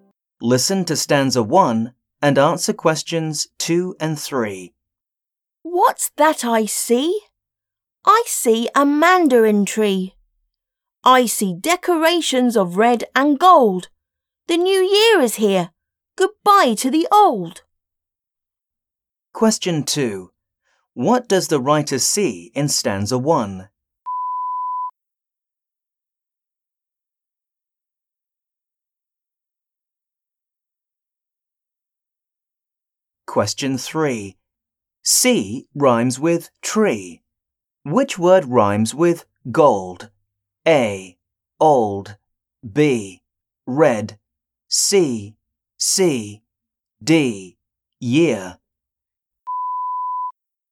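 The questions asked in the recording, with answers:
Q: What does the writer see in stanza 1?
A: A mandarin tree and decorations of red and gold

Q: Which word rhymes with gold?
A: A: Old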